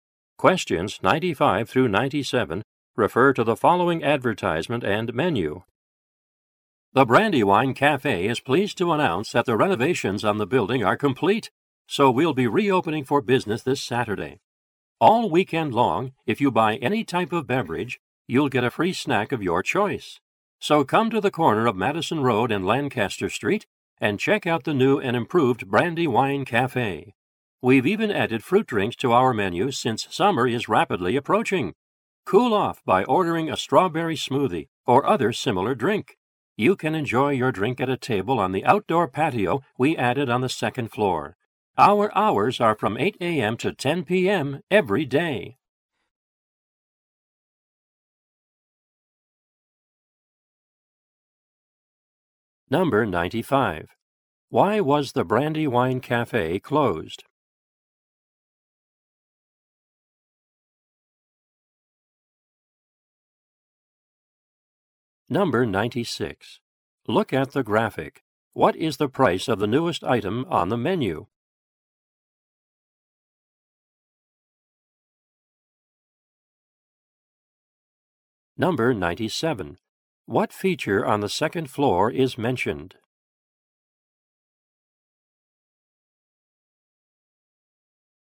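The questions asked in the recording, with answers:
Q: Why was the Brandywine Cafe closed?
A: For renovations

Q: What feature on the second floor is mentioned?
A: An outdoor patio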